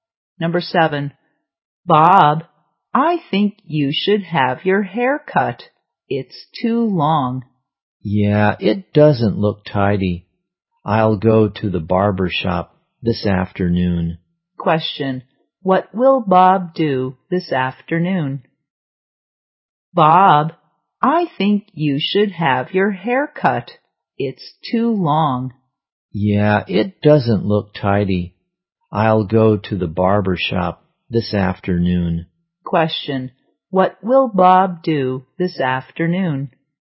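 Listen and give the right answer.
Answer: Go to the barber shop to have his hair cut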